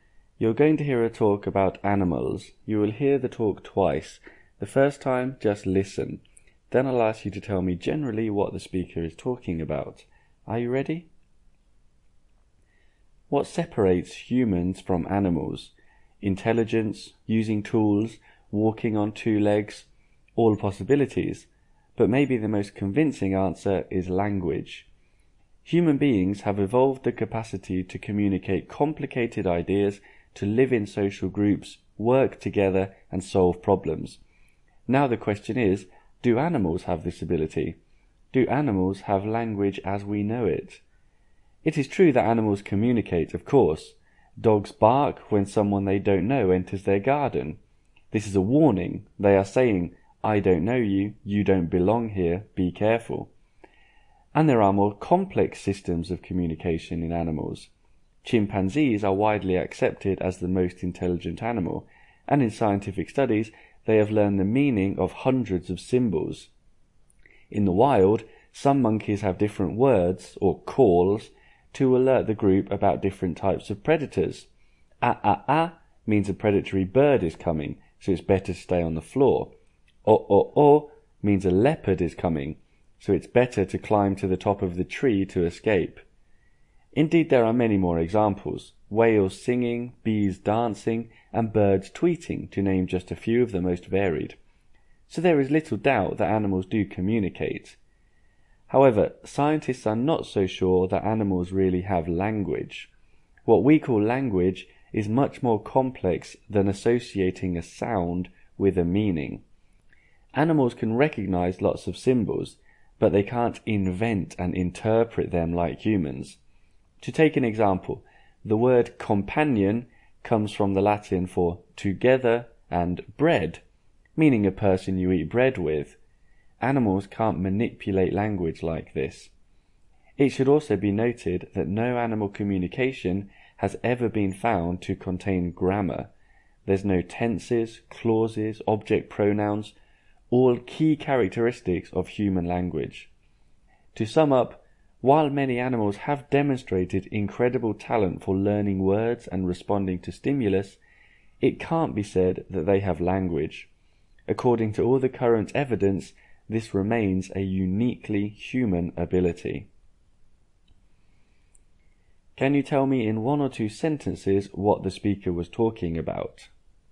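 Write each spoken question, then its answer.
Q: Can you tell me in one or two sentences what the speaker was talking about?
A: Whether animals have language: animals communicate, but they do not really have language, which is unique to humans.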